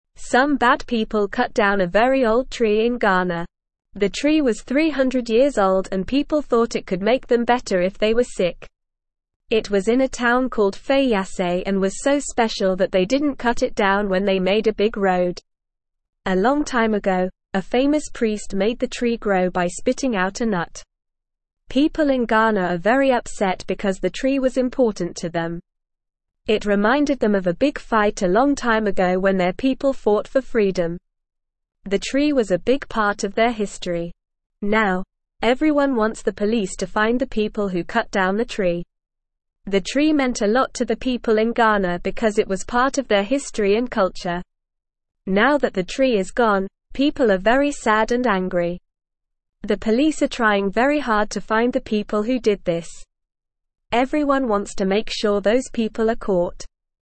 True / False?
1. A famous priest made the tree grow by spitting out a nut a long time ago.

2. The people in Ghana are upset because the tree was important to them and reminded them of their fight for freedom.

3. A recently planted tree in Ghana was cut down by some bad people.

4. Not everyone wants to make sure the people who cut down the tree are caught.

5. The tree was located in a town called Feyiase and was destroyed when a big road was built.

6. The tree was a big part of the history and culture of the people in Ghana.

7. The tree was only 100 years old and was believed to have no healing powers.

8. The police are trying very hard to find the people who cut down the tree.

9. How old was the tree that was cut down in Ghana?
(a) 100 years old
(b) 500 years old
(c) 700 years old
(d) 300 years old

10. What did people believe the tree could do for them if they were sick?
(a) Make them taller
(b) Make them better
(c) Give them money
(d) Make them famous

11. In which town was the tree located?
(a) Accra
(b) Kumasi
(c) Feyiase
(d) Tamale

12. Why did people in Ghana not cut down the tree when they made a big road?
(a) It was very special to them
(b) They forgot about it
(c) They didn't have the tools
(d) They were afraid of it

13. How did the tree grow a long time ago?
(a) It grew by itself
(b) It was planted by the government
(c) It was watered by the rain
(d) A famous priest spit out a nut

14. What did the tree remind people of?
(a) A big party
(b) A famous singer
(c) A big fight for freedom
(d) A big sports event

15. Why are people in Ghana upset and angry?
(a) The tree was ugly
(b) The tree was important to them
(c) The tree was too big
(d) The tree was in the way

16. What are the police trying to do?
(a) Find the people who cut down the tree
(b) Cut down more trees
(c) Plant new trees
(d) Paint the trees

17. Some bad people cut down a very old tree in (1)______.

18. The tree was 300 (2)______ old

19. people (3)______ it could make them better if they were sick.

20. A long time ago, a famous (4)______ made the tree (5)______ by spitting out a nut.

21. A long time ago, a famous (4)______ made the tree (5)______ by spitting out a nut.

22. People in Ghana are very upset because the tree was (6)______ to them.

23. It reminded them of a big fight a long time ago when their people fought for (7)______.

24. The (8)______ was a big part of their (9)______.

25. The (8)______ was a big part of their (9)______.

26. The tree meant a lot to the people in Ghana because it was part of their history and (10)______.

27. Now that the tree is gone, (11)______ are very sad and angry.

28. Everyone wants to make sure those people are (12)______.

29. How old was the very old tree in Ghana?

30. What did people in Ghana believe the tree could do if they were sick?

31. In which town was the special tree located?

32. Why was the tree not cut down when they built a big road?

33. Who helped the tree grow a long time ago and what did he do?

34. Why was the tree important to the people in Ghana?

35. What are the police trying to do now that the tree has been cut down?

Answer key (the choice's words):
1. True
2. True
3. False
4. False
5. False
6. True
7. False
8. True
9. 300 years old
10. Make them better
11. Feyiase
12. It was very special to them
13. A famous priest spit out a nut
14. A big fight for freedom
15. The tree was important to them
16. Find the people who cut down the tree
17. Ghana
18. years
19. thought
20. priest
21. grow
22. important
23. freedom
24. tree
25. history
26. culture
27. people
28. caught
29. The tree was 300 years old.
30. People thought the tree could make them better if they were sick.
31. The tree was in a town called Feyiase.
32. The tree was so special that they left it standing even when they made a big road.
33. A famous priest helped the tree grow by spitting out a nut.
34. The tree was important because it was part of their history and reminded them of a big fight for freedom.
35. The police are trying very hard to find the people who cut down the tree.

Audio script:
Some bad people cut down a very old tree in Ghana. The tree was 300 years old and people thought it could make them better if they were sick. It was in a town called Feyiase and was so special that they didn't cut it down when they made a big road. A long time ago, a famous priest made the tree grow by spitting out a nut.
People in Ghana are very upset because the tree was important to them. It reminded them of a big fight a long time ago when their people fought for freedom. The tree was a big part of their history. Now, everyone wants the police to find the people who cut down the tree.
The tree meant a lot to the people in Ghana because it was part of their history and culture. Now that the tree is gone, people are very sad and angry. The police are trying very hard to find the people who did this. Everyone wants to make sure those people are caught.

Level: Level 2